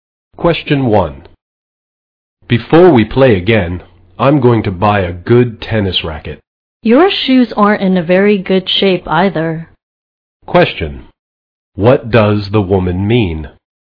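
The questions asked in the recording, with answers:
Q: What does the woman mean?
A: The man needs new tennis shoes too.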